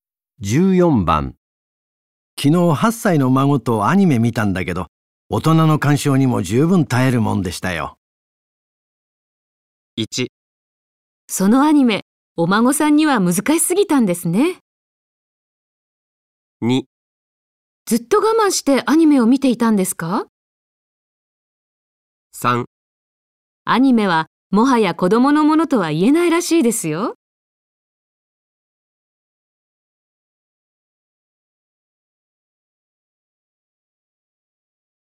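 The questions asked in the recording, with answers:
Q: 昨日8歳の孫とアニメ見たんだけど、大人の鑑賞にも十分耐えるもんでしたよ。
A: 3: アニメはもはや子供のものとは言えないらしいですよ。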